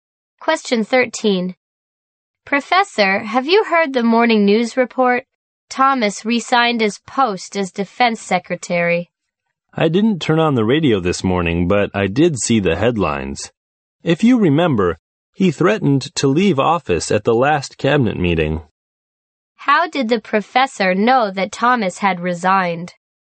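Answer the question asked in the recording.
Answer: He saw the headlines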